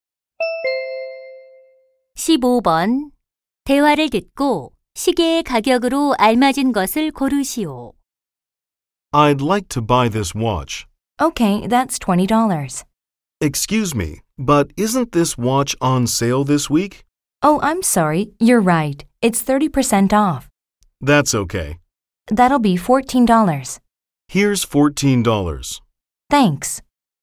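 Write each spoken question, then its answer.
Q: 대화를 듣고 시계의 가격으로 알맞은 것을 고르시오.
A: 14달러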